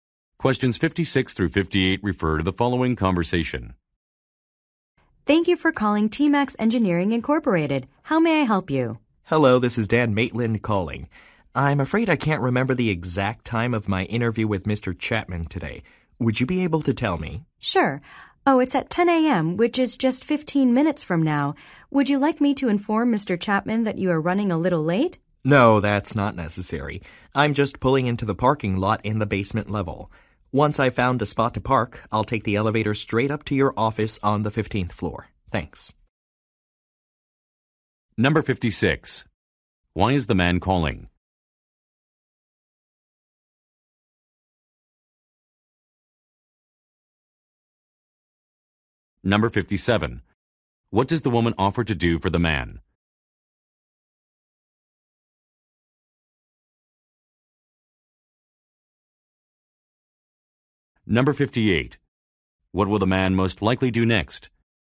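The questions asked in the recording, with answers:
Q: Why is the man calling?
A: To confirm the time of his interview

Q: What does the woman offer to do for the man?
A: Tell Mr. Chapman he is running late

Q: What will the man most likely do next?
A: Park his car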